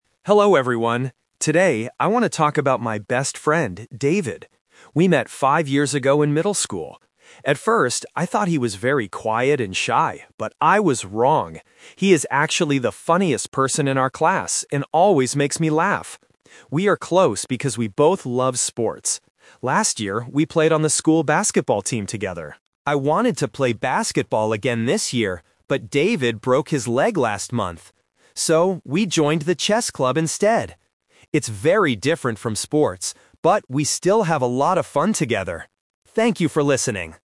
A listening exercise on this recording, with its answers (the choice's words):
Listen to a student talking about his best friend. Choose the correct answer (A, B, or C) for each question.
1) What did the speaker think about David at first?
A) He was very funny.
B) He was quiet and shy.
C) He was good at sports.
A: He was quiet and shy.

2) What did the two friends do together last year?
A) They joined the chess club.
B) They played on the basketball team.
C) They played video games.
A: They played on the basketball team.

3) Why did they join the chess club this year?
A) Because David broke his leg.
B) Because they don't like basketball anymore.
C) Because they want to learn a new game.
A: Because David broke his leg.

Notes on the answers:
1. This is "The Twist" about personality. The speaker says, "At first, I thought he was very quiet and shy, but I was wrong!" Option (A) is a trap because David is funny now, but the question asks what the speaker thought at first. Option (C) is a true fact about David later, but not the first impression.
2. The speaker clearly states, "Last year, we played on the school basketball team together." Option (A) is a trap because the chess club is what they do this year. Option (C) is not mentioned in the audio.
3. This is another "Twist". The speaker wanted to play basketball again, but things changed. He explains: "but David broke his leg last month. So, we joined the chess club instead." Option (B) is incorrect because they still love sports. Option (C) is a plausible reason to join a chess club, but it is not the reason mentioned in the audio.

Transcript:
Student (Monologue): Hello everyone. Today, I want to talk about my best friend, David. We met five years ago in middle school. At first, I thought he was very quiet and shy, but I was wrong! He is actually the funniest person in our class and always makes me laugh. We are close because we both love sports. Last year, we played on the school basketball team together. I wanted to play basketball again this year, but David broke his leg last month. So, we joined the chess club instead. It's very different from sports, but we still have a lot of fun together. Thank you for listening.